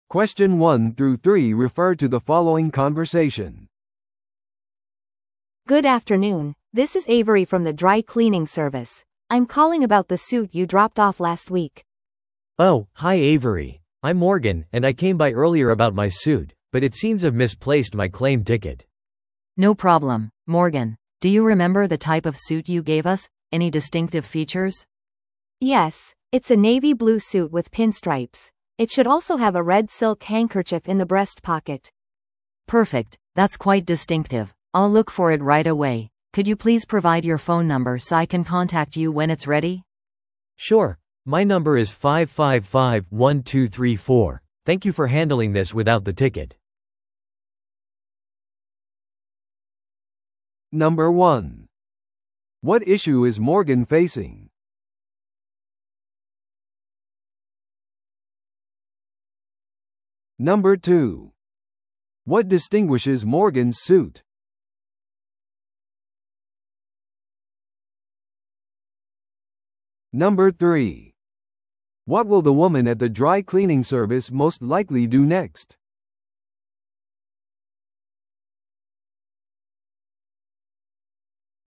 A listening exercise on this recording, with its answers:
Listen to the audio below and answer the questions.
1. What issue is Morgan facing?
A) Morganはスーツをピックアップする時期を覚えていない。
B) Morganはスーツの引き取り票を失くした。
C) クリーニング店がMorganのスーツを失くした。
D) スーツが適切にクリーニングされていない。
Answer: B) Morganはスーツの引き取り票を失くした。

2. What distinguishes Morgan's suit?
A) それはハンカチのないチャコールグレーのスーツです。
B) ブランドのラベルが外側に見える。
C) ネイビーブルーにピンストライプ、赤いシルクのハンカチがある。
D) 左袖に破れがある。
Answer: C) ネイビーブルーにピンストライプ、赤いシルクのハンカチがある。

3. What will the woman at the dry cleaning service most likely do next?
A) スーツを特定するために、店に来るようMorganに頼む。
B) 提供された説明に基づいてスーツを探す。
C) Morganに新しい引き取り票を発行するよう依頼する。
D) 同様のスーツを持つ別の顧客に電話する。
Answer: B) 提供された説明に基づいてスーツを探す。

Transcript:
A: Good afternoon, this is Avery from the dry cleaning service. I'm calling about the suit you dropped off last week.
B: Oh, hi Avery. I'm Morgan, and I came by earlier about my suit, but it seems I've misplaced my claim ticket.
C: No problem, Morgan. Do you remember the type of suit you gave us? Any distinctive features?
A: Yes, it's a navy blue suit with pinstripes. It should also have a red silk handkerchief in the breast pocket.
C: Perfect, that's quite distinctive. I'll look for it right away. Could you please provide your phone number so I can contact you when it's ready?
B: Sure, my number is 555-1234. Thank you for handling this without the ticket.

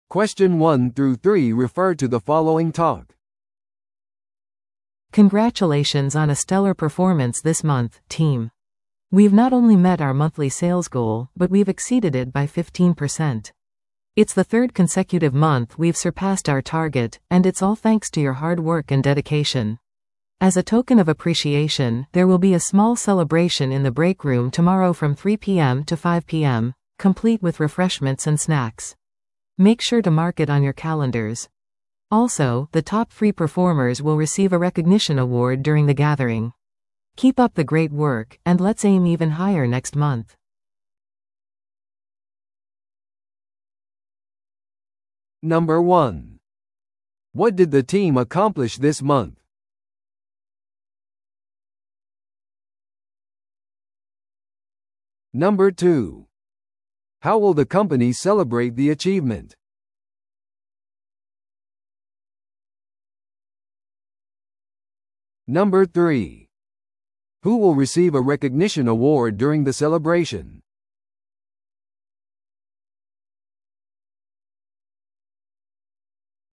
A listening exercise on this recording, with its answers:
Listen to the audio below and answer the questions.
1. What did the team accomplish this month?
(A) 彼らは残業をした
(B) 彼らは月間目標にぴったり達した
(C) 彼らは月間販売目標を上回った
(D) 彼らは最低の販売記録を持っていた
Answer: (C) 彼らは月間販売目標を上回った

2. How will the company celebrate the achievement?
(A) 全社員にメールを送る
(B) 皆に休みを与える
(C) 休憩室でパーティーをする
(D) 販売目標を上げることで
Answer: (C) 休憩室でパーティーをする

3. Who will receive a recognition award during the celebration?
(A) 全従業員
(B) チームリーダー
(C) 上位3名のパフォーマー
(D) 営業マネージャー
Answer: (C) 上位3名のパフォーマー

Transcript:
Congratulations on a stellar performance this month, team! We've not only met our monthly sales goal, but we've exceeded it by 15%. It's the third consecutive month we've surpassed our target, and it's all thanks to your hard work and dedication. As a token of appreciation, there will be a small celebration in the break room tomorrow from 3pm to 5pm, complete with refreshments and snacks. Make sure to mark it on your calendars. Also, the top three performers will receive a recognition award during the gathering. Keep up the great work, and let's aim even higher next month!

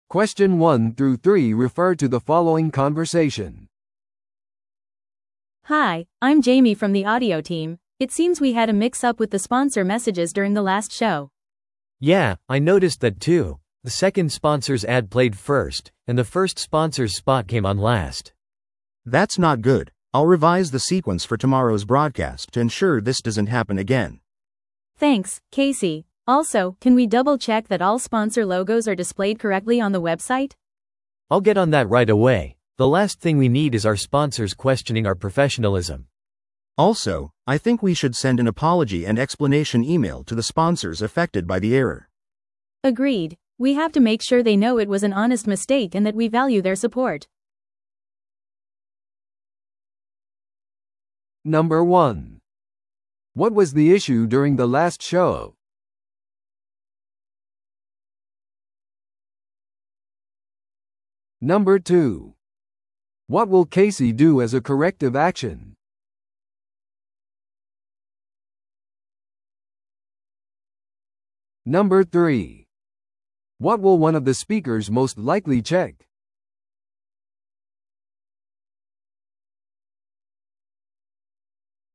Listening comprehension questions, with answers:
Listen to the audio below and answer the questions.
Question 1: What was the issue during the last show?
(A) 間違った音楽が流れました。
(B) オーディオ機器が故障しました。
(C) 間違ったスポンサー広告が放映されました。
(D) ショーが予定時間を超えました。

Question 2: What will Casey do as a corrective action?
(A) 購読者にニュースレターを送る。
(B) ラジオ番組のソーシャルメディアを更新する。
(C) 次のショーのためにスポンサー広告の順番を修正する。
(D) それぞれのスポンサーに直接電話して謝る。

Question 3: What will one of the speakers most likely check?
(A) 放送の音質。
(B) ウェブサイト上のスポンサーロゴの表示。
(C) リスナーに連絡するためのメールテンプレート。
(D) ラジオ番組のイントロダクション用の台本。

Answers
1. (C) 間違ったスポンサー広告が放映されました。
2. (C) 次のショーのためにスポンサー広告の順番を修正する。
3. (B) ウェブサイト上のスポンサーロゴの表示。

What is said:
A: Hi, I'm Jamie from the audio team. It seems we had a mix-up with the sponsor messages during the last show.
B: Yeah, I noticed that too. The second sponsor's ad played first, and the first sponsor's spot came on last.
C: That's not good. I'll revise the sequence for tomorrow's broadcast to ensure this doesn't happen again.
A: Thanks, Casey. Also, can we double-check that all sponsor logos are displayed correctly on the website?
B: I'll get on that right away. The last thing we need is our sponsors questioning our professionalism.
C: Also, I think we should send an apology and explanation email to the sponsors affected by the error.
A: Agreed. We have to make sure they know it was an honest mistake and that we value their support.

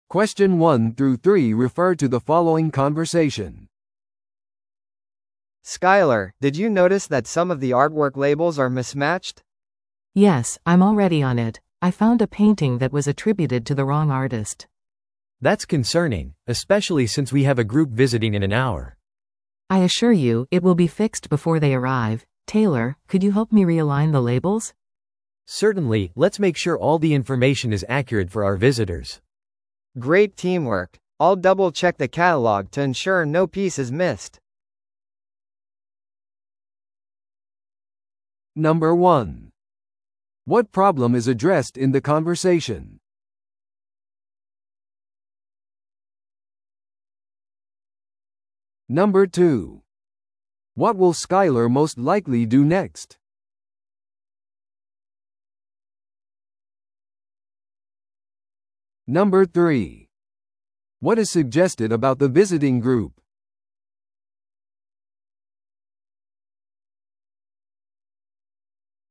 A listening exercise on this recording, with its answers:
Listen to the audio below and answer the questions.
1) What problem is addressed in the conversation?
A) ギャラリーの開館時間が間違っている。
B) アート作品のラベルが混在している。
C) 団体訪問がキャンセルされた。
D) アート作品が欠けている。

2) What is suggested about the visiting group?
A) 遅れている。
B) ガイド付きツアーを期待している。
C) 1時間後に来る。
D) 彼らはプロの批評家である。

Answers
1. B) アート作品のラベルが混在している。
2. C) 1時間後に来る。

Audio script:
A: Skyler, did you notice that some of the artwork labels are mismatched?
B: Yes, I'm already on it. I found a painting that was attributed to the wrong artist.
C: That's concerning, especially since we have a group visiting in an hour.
B: I assure you, it will be fixed before they arrive. Taylor, could you help me realign the labels?
C: Certainly, let's make sure all the information is accurate for our visitors.
A: Great teamwork. I'll double-check the catalog to ensure no piece is missed.

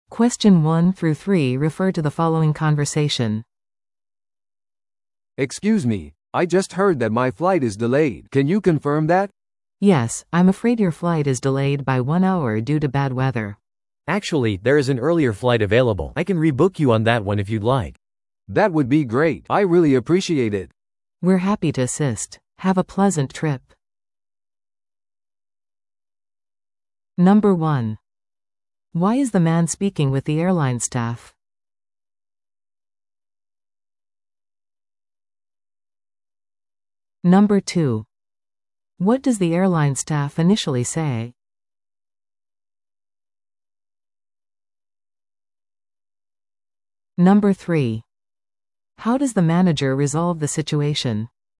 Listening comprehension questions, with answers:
Listen to the audio below and answer the questions.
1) Why is the man speaking with the airline staff?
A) フライトのチェックインをするため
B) 座席のアップグレードを依頼するため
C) フライトの遅延について問い合わせるため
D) 目的地を変更するため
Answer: C) フライトの遅延について問い合わせるため

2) What does the airline staff initially say?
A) フライトは1時間遅延している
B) フライトはキャンセルされた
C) フライトは定刻通りである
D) 出発時間が未定である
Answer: A) フライトは1時間遅延している

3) How does the manager resolve the situation?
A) 返金を申し出る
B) 乗客を別の早い便に変更する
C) ホテルのバウチャーを提供する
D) 食事クーポンを提供する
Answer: B) 乗客を別の早い便に変更する

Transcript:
A: "Excuse me, I just heard that my flight is delayed. Can you confirm that?"
B: "Yes, I'm afraid your flight is delayed by one hour due to bad weather."
C: "Actually, there is an earlier flight available. I can rebook you on that one if you'd like."
A: "That would be great! I really appreciate it."
B: "We're happy to assist. Have a pleasant trip!"

